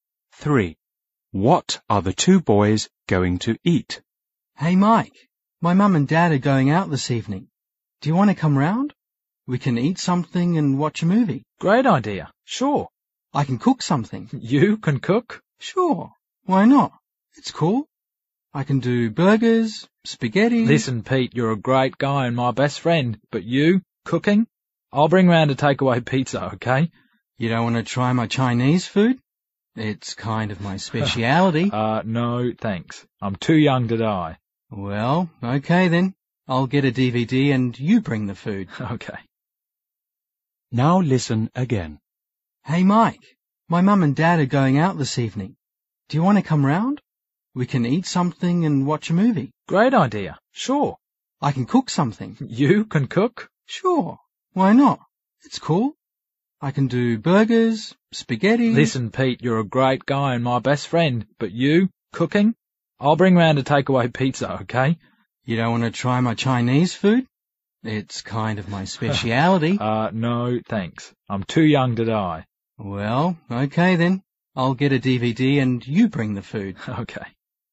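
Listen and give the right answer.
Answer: Takeaway pizza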